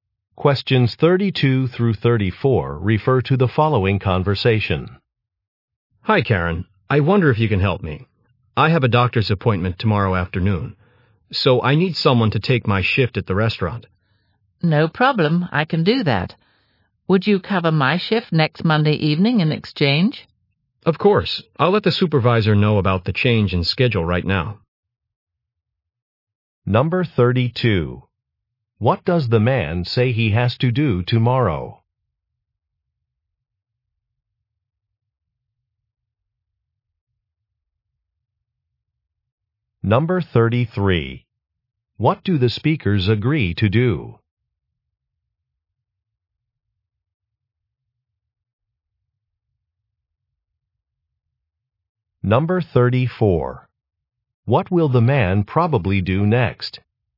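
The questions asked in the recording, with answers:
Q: What does the man say he has to do tomorrow?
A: Go to a doctor's appointment

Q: What do the speakers agree to do?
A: Exchange work shifts

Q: What will the man probably do next?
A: Tell the supervisor about the schedule change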